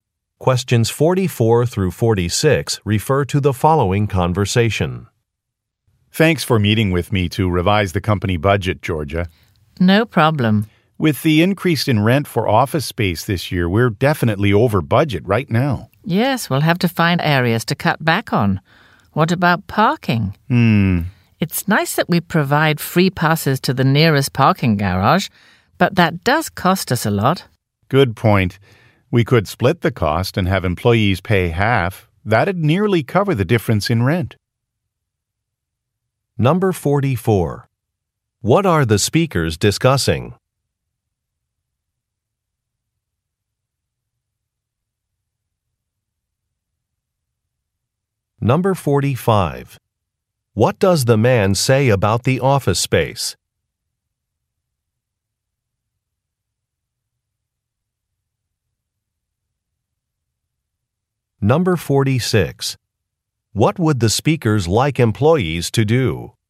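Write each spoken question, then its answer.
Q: What are the speakers discussing?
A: Revising the company budget

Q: What does the man say about the office space?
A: The rent has increased

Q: What would the speakers like employees to do?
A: Pay half the cost of parking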